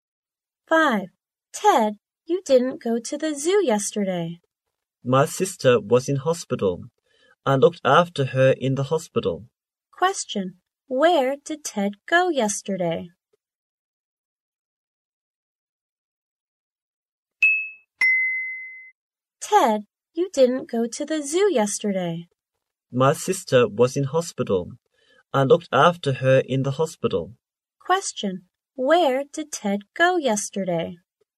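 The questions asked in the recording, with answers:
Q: Where did Ted go yesterday?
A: To the hospital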